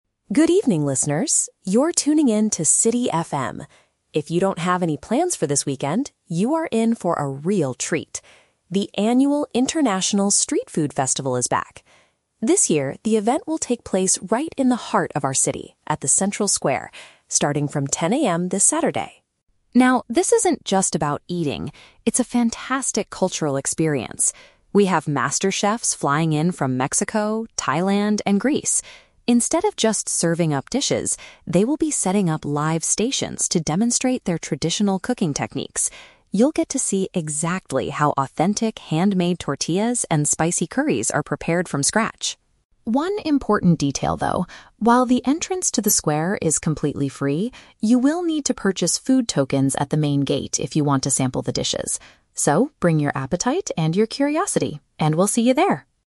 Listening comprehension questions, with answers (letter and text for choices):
Listen to a local radio announcer talking about an upcoming event. Choose the correct answer (A, B, or C) for each question.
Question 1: Where exactly is the food festival being held?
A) Inside a popular new restaurant downtown.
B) In the middle of the local municipality.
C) At the City FM radio station headquarters.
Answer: B) In the middle of the local municipality.

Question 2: What special activity will the international chefs do?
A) They will show visitors how to make their native meals.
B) They will teach people how to eat spicy curries properly.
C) They will give away free handmade tortillas to everyone.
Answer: A) They will show visitors how to make their native meals.

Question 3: What do visitors need to know about payment at the festival?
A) They must pay a strict fee to pass through the main gate.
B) They have to buy special vouchers to try the food.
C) They can only use cash to buy ingredients from the chefs.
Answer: B) They have to buy special vouchers to try the food.

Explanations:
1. The announcer says the event will take place "right in the heart of our city" (in the middle of the local municipality). Option (A) is a trap; it is a street food festival at a square, not inside a restaurant. Option (C) is a trap; City FM is the name of the radio station broadcasting the news, not the event location.
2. The announcer states the chefs will "demonstrate their traditional cooking techniques" and show how dishes are "prepared from scratch" (show visitors how to make their native meals). Option (B) is a trap; "spicy curries" are mentioned as food being made, but the chefs aren't teaching people how to eat them. Option (C) is a trap; "handmade tortillas" are mentioned, but they are not giving them away for free.
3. The speaker says visitors need to "purchase food tokens" if they want to "sample the dishes" (buy special vouchers to try the food). Option (A) is a trap; the announcer explicitly says "the entrance to the square is completely free", so there is no fee to pass through the gate. Option (C) is plausible for a street market, but it is not mentioned in the audio.

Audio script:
Radio Announcer: Good evening, listeners! You're tuning in to City FM. If you don't have any plans for this weekend, you are in for a real treat. The annual International Street Food Festival is back! This year, the event will take place right in the heart of our city, at the Central Square, starting from 10 AM this Saturday.
Now, this isn't just about eating; it's a fantastic cultural experience. We have master chefs flying in from Mexico, Thailand, and Greece. Instead of just serving up dishes, they will be setting up live stations to demonstrate their traditional cooking techniques. You'll get to see exactly how authentic handmade tortillas and spicy curries are prepared from scratch.
One important detail, though: while the entrance to the square is completely free, you will need to purchase food tokens at the main gate if you want to sample the dishes. So, bring your appetite and your curiosity, and we'll see you there!